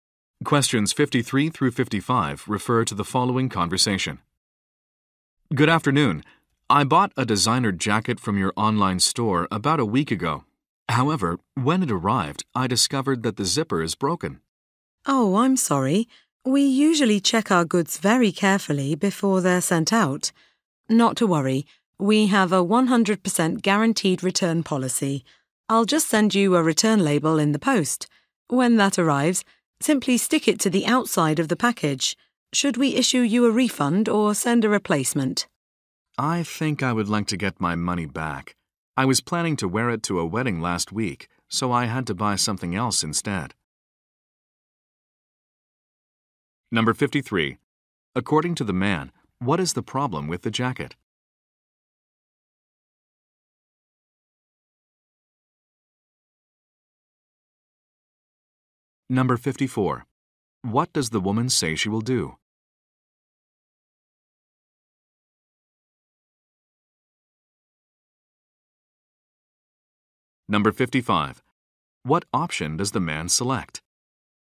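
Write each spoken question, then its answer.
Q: According to the man, what is the problem with the jacket?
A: The zipper is broken

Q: What does the woman say she will do?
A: Send a return label

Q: What option does the man select?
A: A refund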